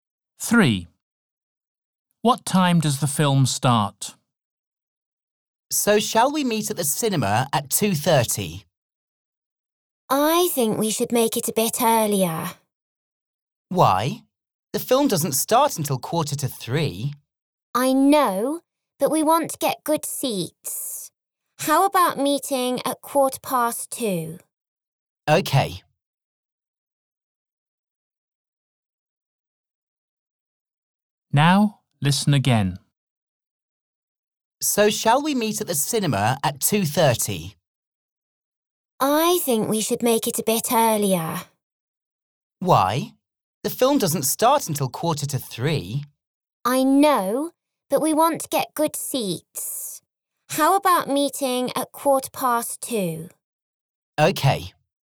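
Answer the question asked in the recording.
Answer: 2:45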